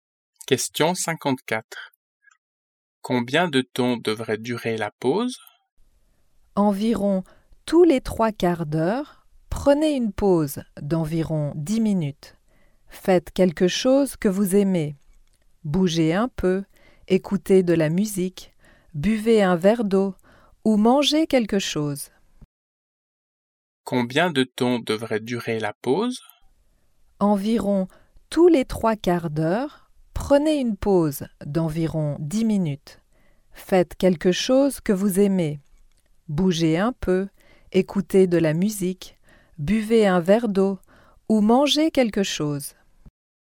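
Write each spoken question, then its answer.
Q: Combien de temps devrait durer la pause?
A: Environ 10 minutes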